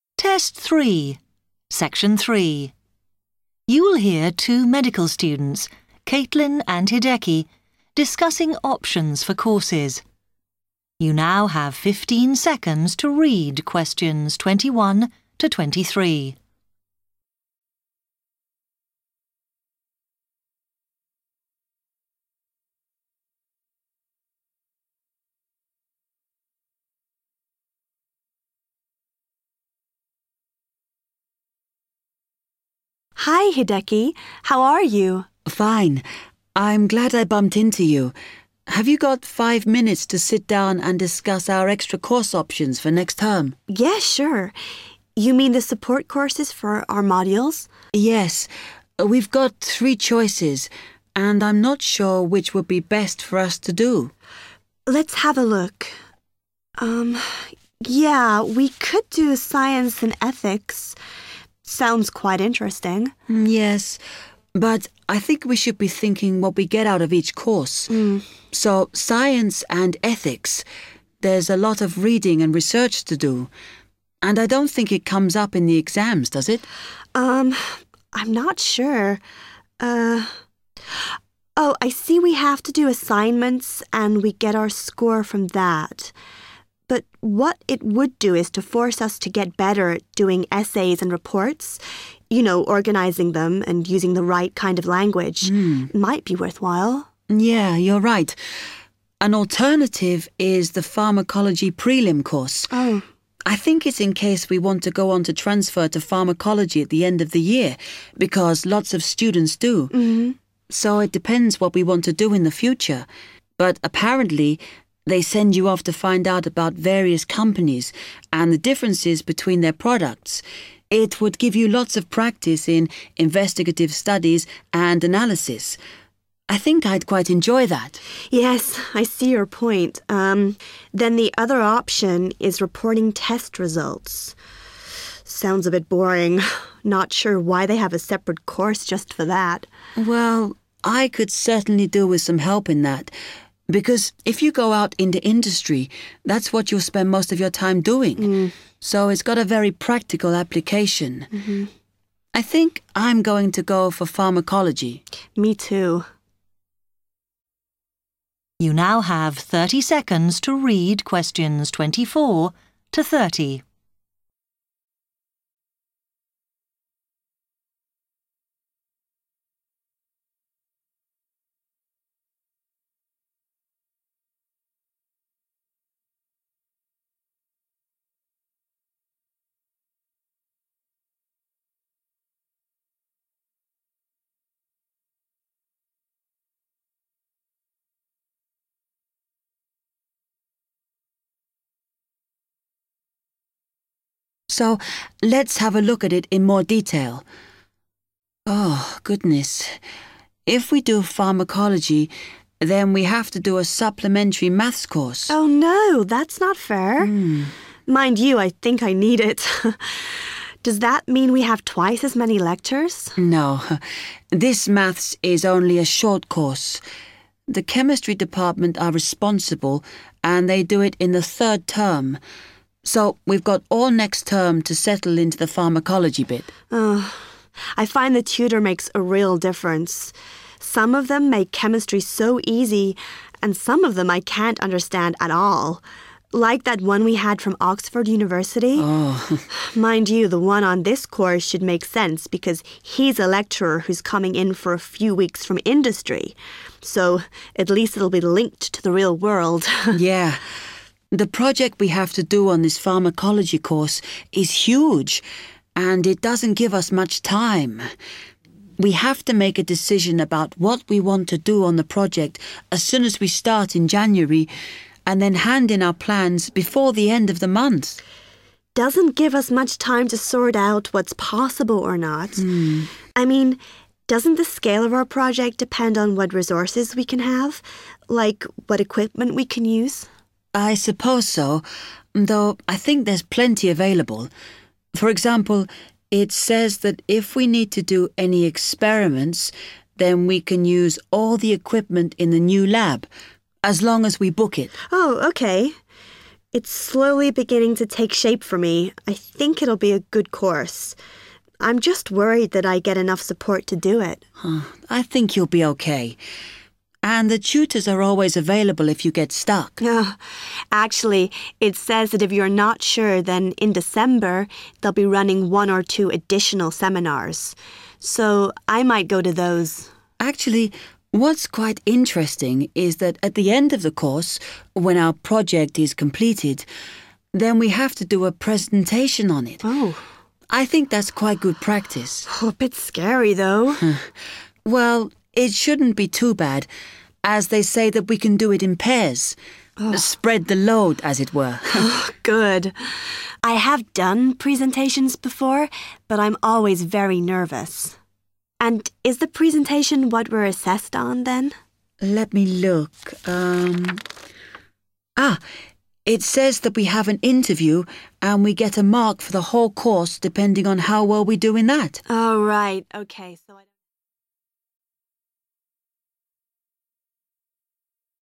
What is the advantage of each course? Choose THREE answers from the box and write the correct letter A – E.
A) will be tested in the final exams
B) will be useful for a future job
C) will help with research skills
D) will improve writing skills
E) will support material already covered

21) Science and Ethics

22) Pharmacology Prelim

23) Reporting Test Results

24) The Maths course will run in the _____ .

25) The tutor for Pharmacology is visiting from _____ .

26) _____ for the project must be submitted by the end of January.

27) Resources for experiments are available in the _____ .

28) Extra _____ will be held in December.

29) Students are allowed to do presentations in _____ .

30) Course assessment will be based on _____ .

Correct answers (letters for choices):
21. D
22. C
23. B
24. third term
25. industry
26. plans
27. new lab / new laboratory
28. seminars
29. pairs
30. an interview / interview

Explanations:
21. The correct answer is D because Caitlin notes that taking the Science and Ethics course would "force us to get better at doing essays and reports – you know, organising them and using the right kind of language." Here, getting better at writing essays and reports with the proper language directly corresponds to improving writing skills.
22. The correct answer is C because Hideki mentions that in the Pharmacology Prelim course, students have to find information about different companies and their products. He explains that this "would give you lots of practice in investigative studies and analysis." The phrase "practice in investigative studies and analysis" directly means building or improving research skills.
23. The correct answer is B because Hideki explains that learning how to report test results has a very practical purpose. He mentions that if you "go out into industry" (meaning working in a real job or company), reporting test results is "what you'll spend most of your time doing." Therefore, this course will be directly useful for a future job.
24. The correct answer is "third term" because Hideki mentions that the supplementary Maths course is organized by the Chemistry department and is taught during the third term. Therefore, the course will run in the "third term".
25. The correct answer is "industry" because Caitlin talks about the lecturer teaching the course. She mentions that he is "coming in for a few weeks from industry", which directly matches the sentence prompt stating that the tutor is "visiting from industry".
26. The correct answer is "plans" because Hideki mentions that after starting the project in January, they must "hand in our plans before the end of the month". In the question, "must be submitted" matches the phrase "hand in", and "by the end of January" matches "before the end of the month".
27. The correct answer is "new lab" (or "laboratory") because Hideki explains where students can find tools and equipment to do their experiments. In the conversation, Caitlin asks about the equipment they can use, and Hideki responds that they can use all the equipment located in the "new lab" if they reserve it.
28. The correct answer is "seminars" because Caitlin mentions that extra or additional sessions will take place in December. In the sentence, the word "extra" means the same as "additional", and "will be held" matches "they'll be running".
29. The correct answer is confirmed when Hideki mentions that they have to do a presentation at the end of the project, and notes that students are permitted to give the presentation in "pairs" to share the workload. Keywords include "do it in pairs", which directly completes "allowed to do presentations in [pairs]".
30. The correct answer is "(an) interview" because Caitlin asks if their final grading ("what we're assessed on") is based on the presentation. Hideki checks the information and clarifies that students will have an "interview" to get their final grade ("get a mark for the whole course"). Keywords to pay attention to include "assessed on", which relates to "assessment", and "get a mark", which refers to grading.

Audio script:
Caitlin: Hi, Hideki. How are you?
Hideki: Fine. I'm glad I bumped into you. Have you got five minutes to sit down and discuss our extra course options for next term?
Caitlin: Yes, sure. You mean the support courses for our modules?
Hideki: Yes. We've got three choices and I'm not sure which would be best for us to do.
Caitlin: Let's have a look. Yeah – we could do Science and Ethics – sounds quite interesting.
Hideki: Yes – but I think we should be thinking what we get out of each course. So Science and Ethics – there's a lot of reading and research to do. And I don't think it comes up in the exams, does it?
Er – oh, I see we have to do assignments and we get our score from that. But what it would do is to force us to get better at doing essays and reports – you know, organising them and using the right kind of language. Might be worthwhile?
Hideki: Yeah, you're right. An alternative is the Pharmacology Prelim course. I think it's in case we want to go on to transfer to Pharmacology at the end of the year because lots of students do. So it depends what we want to do in the future, but apparently they send you off to find out about various companies and the differences between their products – it would give you lots of practice in investigative studies and analysis. I think I'd quite enjoy that.
Caitlin: Yes, I see your point. Um, then the other option is Reporting Test Results – sounds a bit boring. Not sure why they have a separate course just for that?
Hideki: Well, I could certainly do with some help in that because if you go out into industry, that's what you'll spend most of your time doing, so it's got a very practical application. I think I'm going to go for Pharmacology.
Caitlin: Me too.
Hideki: So let's have a look at it in more detail. Oh, goodness – if we do Pharmacology then we have to do a supplementary Maths course.
Caitlin: Oh no – that's not fair. Mind you, I think I need it. Does that mean we have twice as many lectures?
Hideki: No, this Maths is only a short course. The Chemistry department are responsible and they do it in the third term. So we've got all next term to settle into the Pharmacology bit.
Caitlin: I find the tutor makes a real difference – some of them make Chemistry so easy and some of them I can't understand at all – like that one we had from Oxford University. Mind you, the one on this course should make sense because he's a lecturer who's coming in for a few weeks from industry so at least it'll be linked to the real world!
Hideki: Yeah. The project we have to do on this pharmacology course is huge and it doesn't give us much time. We have to make a decision about what we want to do on the project as soon as we start in January, and then hand in our plans before the end of the month!
Caitlin: Doesn't give us much time to sort out what's possible or not. I mean, doesn't the scale of our project depend on what resources we can have, like what equipment we can use?
Hideki: I suppose so, though I think there's plenty available. For example, it says that if we need to do any experiments, then we can use all the equipment in the new lab, as long as we book it.
It's slowly beginning to take shape for me. I think it'll be a good course. I'm just worried that I get enough support to do it.
Hideki: I think you'll be OK. And the tutors are always available if you get stuck.
Caitlin: Actually it says that if you're not sure, then, in December, they'll be running one or two additional seminars – so I might go to those.
Hideki: Actually, what's quite interesting is that at the end of the course, when our project is completed, then we have to do a presentation on it. I think that's quite good practice.
Caitlin: Bit scary though!
Hideki: Well, it shouldn't be too bad as they say that we can do it in pairs. Spread the load, as it were!
Caitlin: Oh, good. I have done presentations before but I'm always very nervous. And is the presentation what we're assessed on then?
Hideki: Let me look .... um ... Ah, it says that we have an interview and we get a mark for the whole course depending on how well we do in that.